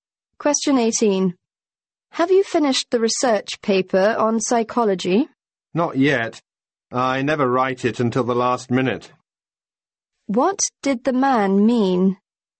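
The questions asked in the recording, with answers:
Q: What did the man mean?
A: He hasn't finished; he always writes it at the last minute.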